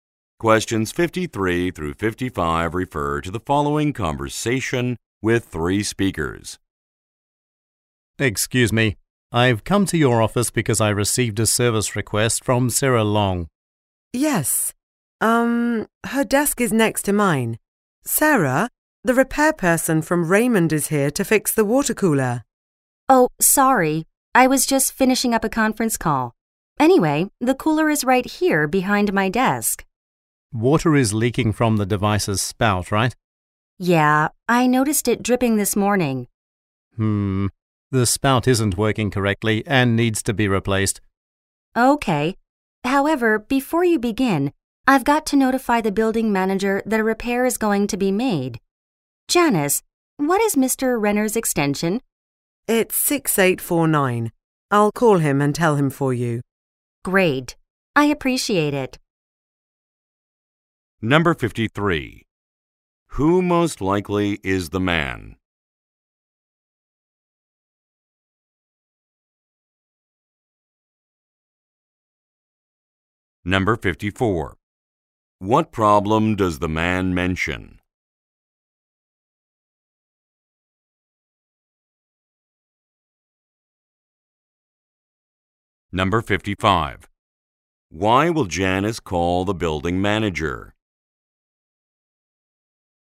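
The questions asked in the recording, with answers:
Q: Who most likely is the man?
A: A repair person

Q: What problem does the man mention?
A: The spout isn't working and needs replacing

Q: Why will Janice call the building manager?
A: To tell him a repair is going to be made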